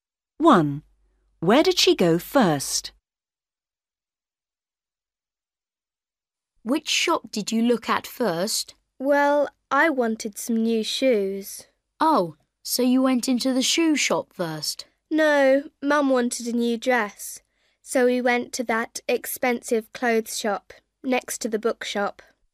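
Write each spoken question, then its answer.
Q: Where did she go first?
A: the expensive clothes shop next to the bookshop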